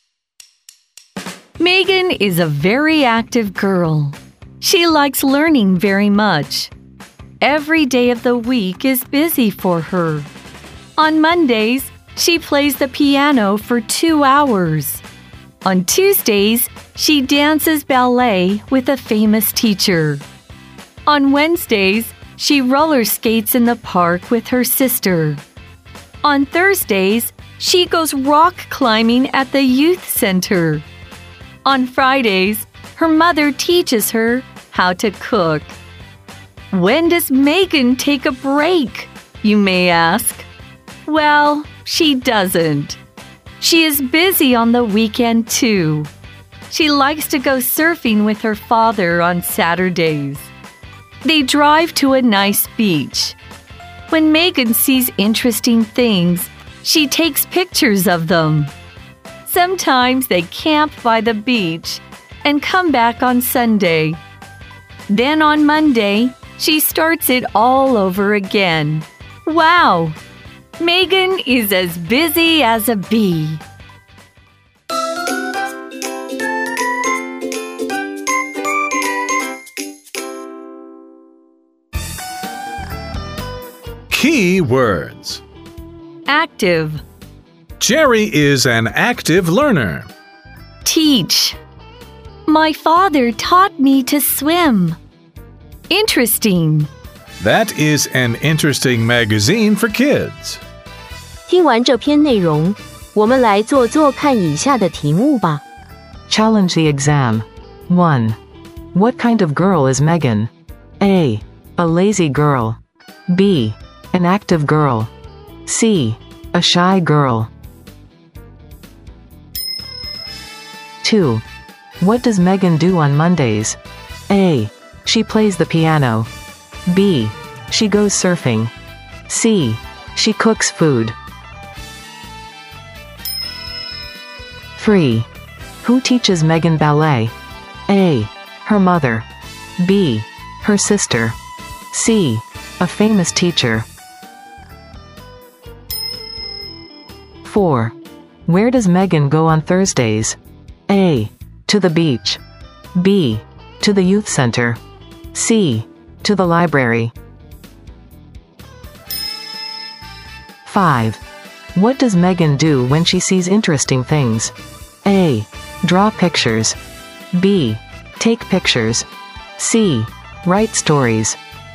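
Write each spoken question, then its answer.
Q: What kind of girl is Megan?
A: B: An active girl.

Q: What does Megan do on Mondays?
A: A: She plays the piano.

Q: Who teaches Megan ballet?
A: C: A famous teacher.

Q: Where does Megan go on Thursdays?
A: B: To the youth center.

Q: What does Megan do when she sees interesting things?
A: B: Take pictures.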